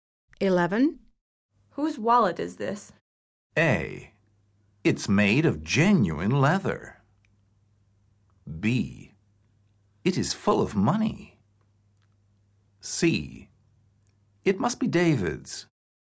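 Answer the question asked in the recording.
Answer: C: It must be David's.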